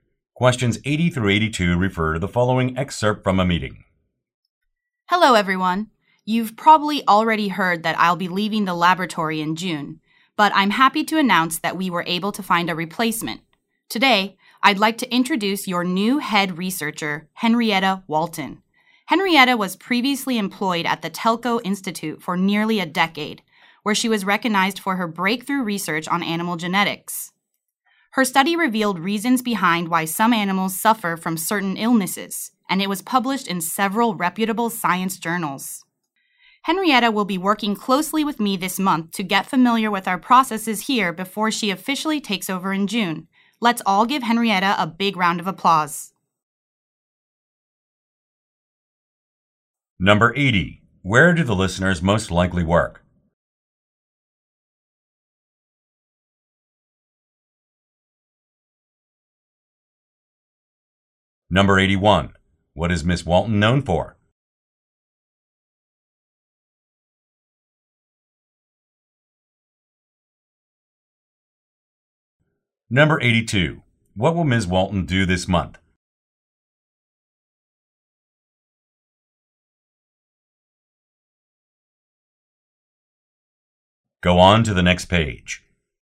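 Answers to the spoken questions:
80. At a laboratory
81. Breakthrough research on animal genetics
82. Work closely with the speaker to learn the lab's processes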